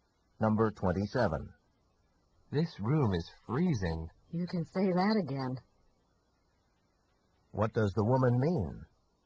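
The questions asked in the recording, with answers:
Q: What does the woman mean?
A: She agrees that the room is very cold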